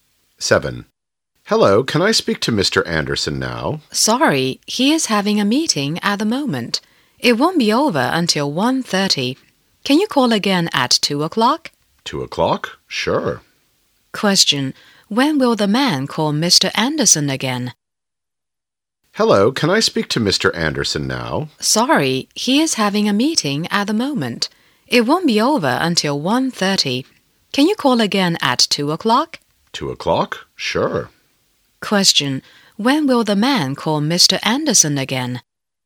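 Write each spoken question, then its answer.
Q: When will the man call Mr. Anderson again?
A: At 2 o'clock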